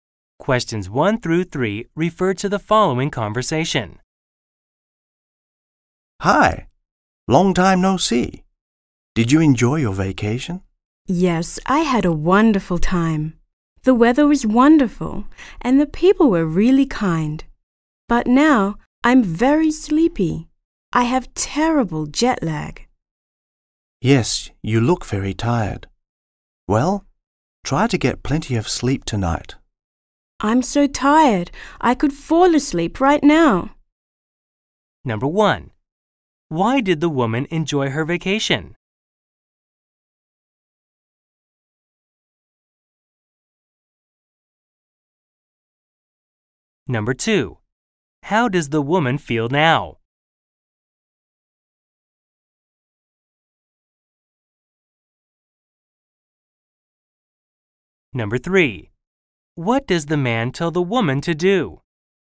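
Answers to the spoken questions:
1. The weather was wonderful and the people were really kind.
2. Very sleepy; she has terrible jet lag.
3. Get plenty of sleep tonight.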